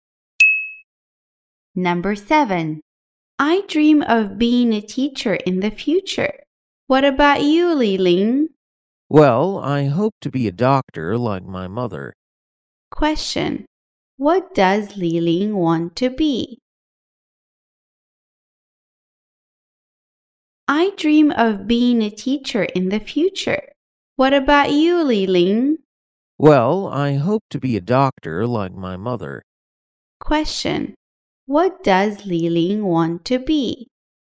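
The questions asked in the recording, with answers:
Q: Question. What does Li Ling want to be?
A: A doctor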